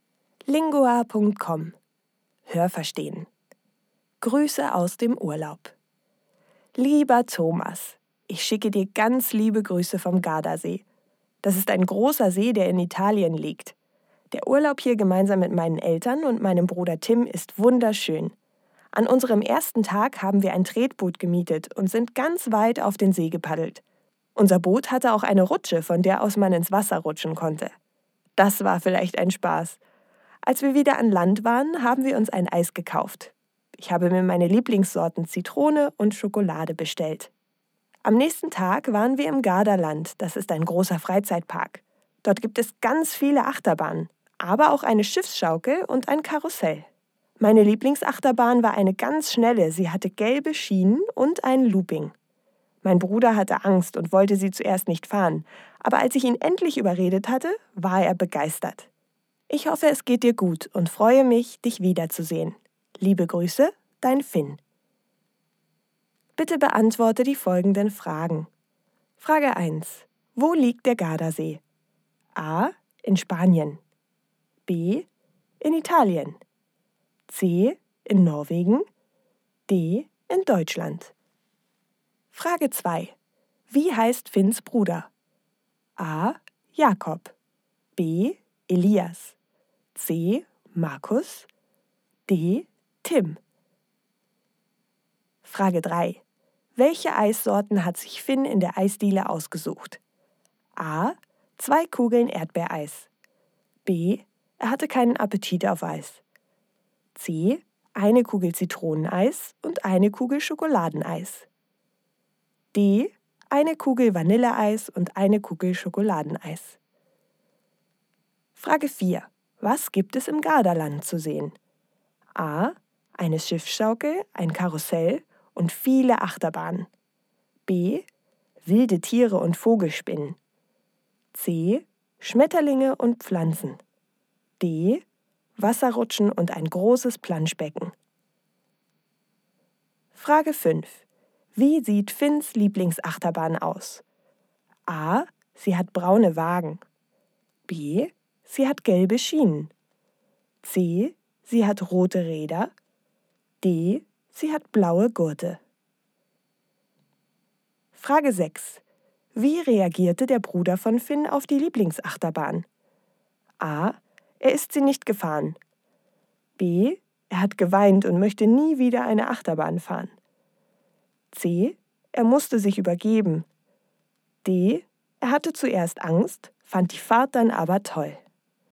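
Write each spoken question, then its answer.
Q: Wo liegt der Gardasee?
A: B: In Italien.

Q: Wie heißt Finns Bruder?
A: D: Tim.

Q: Welche Eissorten hat sich Finn in der Eisdiele ausgesucht?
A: C: Eine Kugel Zitroneneis und eine Kugel Schokoladeneis.

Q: Was gibt es im Gardaland zu sehen?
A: A: Eine Schiffsschaukel, ein Karussell und viele Achterbahnen.

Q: Wie sieht Finns Lieblingsachterbahn aus?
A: B: Sie hat gelbe Schienen.

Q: Wie reagierte der Bruder von Finn auf die Lieblingsachterbahn?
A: D: Er hatte zuerst Angst, fand die Fahrt dann aber toll.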